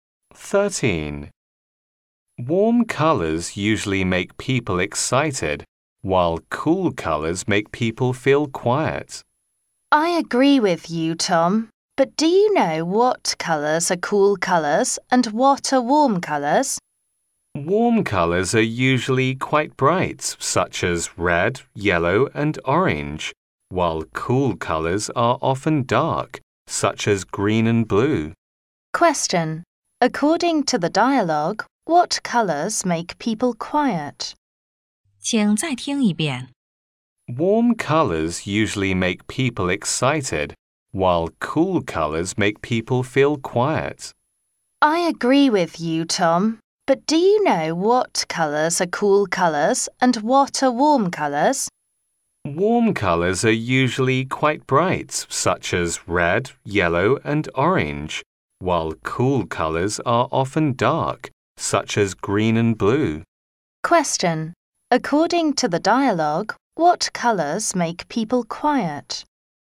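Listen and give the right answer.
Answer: Cool colors, such as green and blue.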